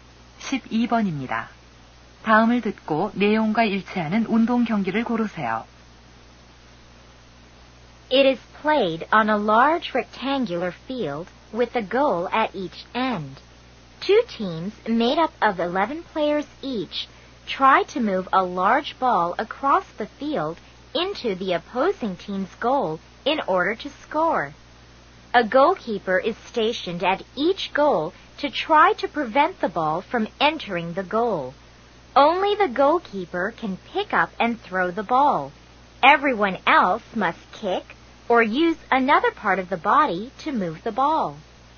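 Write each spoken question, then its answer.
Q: 다음을 듣고 내용과 일치하는 운동 경기를 고르세요.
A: 축구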